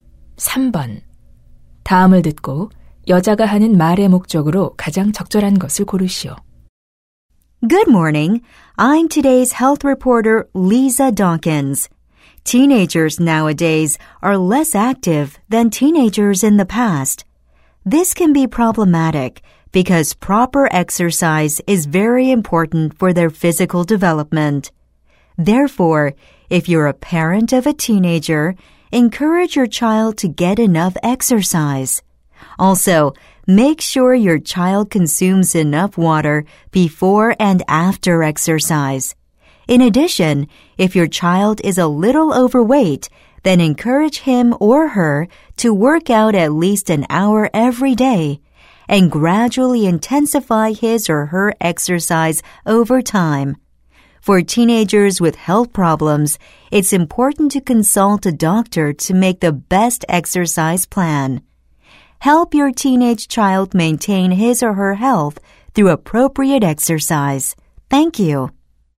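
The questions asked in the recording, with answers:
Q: 다음을 듣고 여자가 하는 말의 목적으로 가장 적절한 것을 고르시오.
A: 10대 자녀가 적절한 운동을 하도록 격려할 것을 부모에게 권하려고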